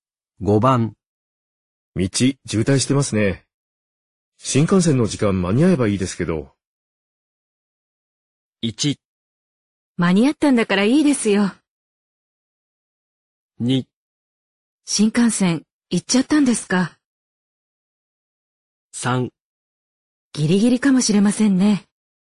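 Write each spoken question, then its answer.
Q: 道、渋滞してますね。新幹線の時間間に合えばいいですけど。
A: 3: ギリギリかもしれませんね。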